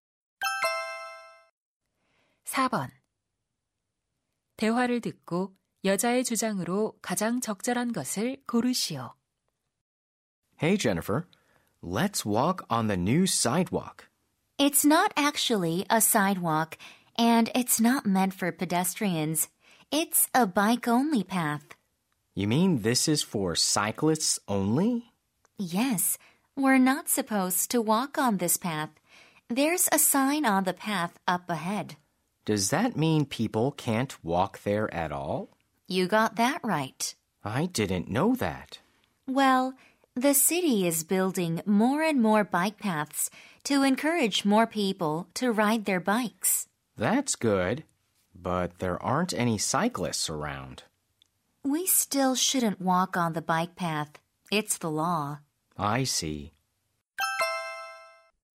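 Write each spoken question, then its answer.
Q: 대화를 듣고 여자의 주장으로 가장 적절한 것을 고르시오.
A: 자전거 전용 도로에서는 걸으면 안 된다.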